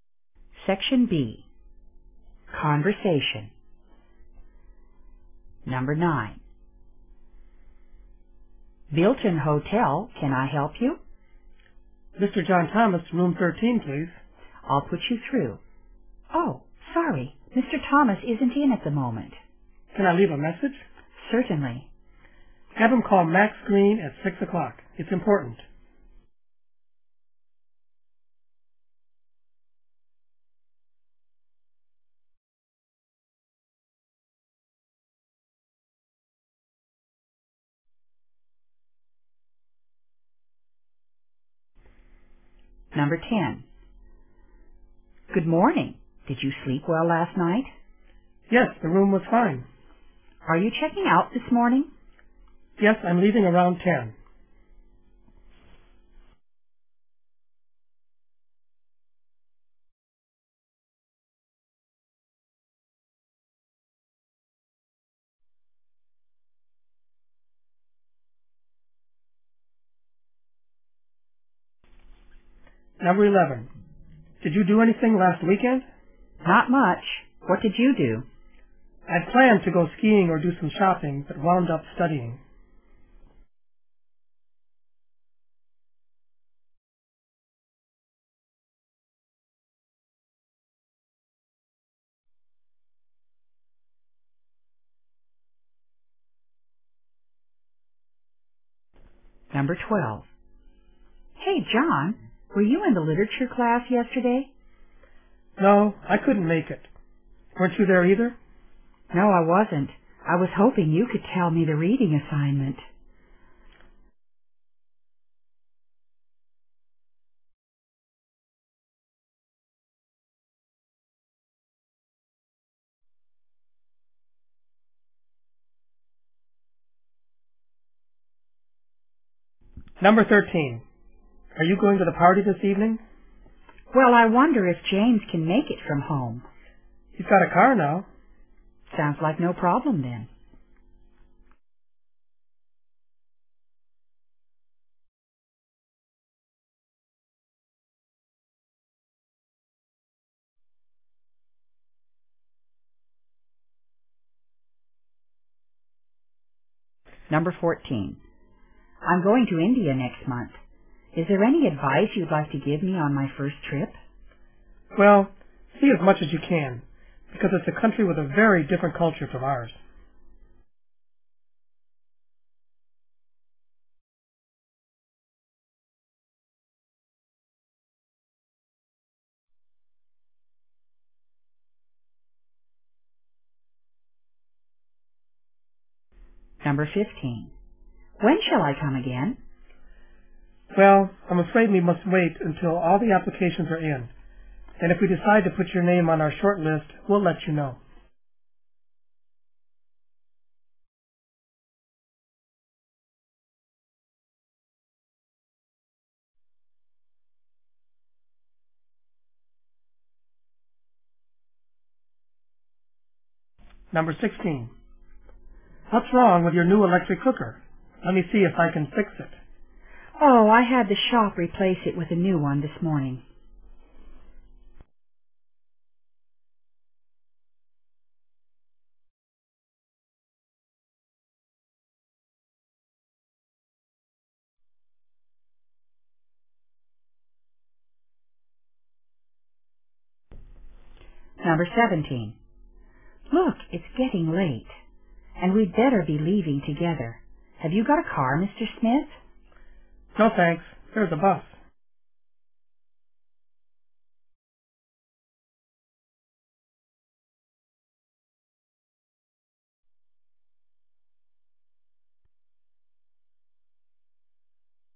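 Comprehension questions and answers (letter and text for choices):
In this section, you will hear nine short conversations between two speakers. At the end of each conversation you will be given 10 seconds to answer the question.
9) Who is the caller?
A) John Smith.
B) Max Thomas.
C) Max Green.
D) John Thomas.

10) The conversation takes place between __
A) a host and a guest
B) two neighbors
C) a doctor and a patient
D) a hotel clerk and a guest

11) What did the man do last weekend?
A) He went skiing.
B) He studied.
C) He did nothing.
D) He did shopping.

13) James is going to __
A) buy a car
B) stay at home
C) go to the party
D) solve the problem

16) What did the woman do this morning?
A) She had the cooker changed.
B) She had her cooker repaired.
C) She bought a new cooker.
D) She returned her new cooker.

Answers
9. C) Max Green.
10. D) a hotel clerk and a guest
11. B) He studied.
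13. C) go to the party
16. A) She had the cooker changed.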